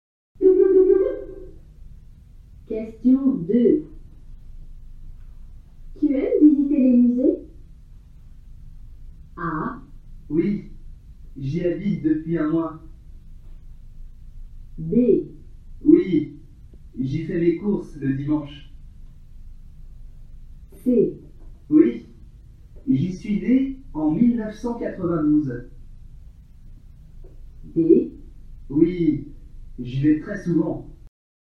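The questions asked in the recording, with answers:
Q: Tu aimes visiter les musées?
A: D: Oui, j'y vais très souvent.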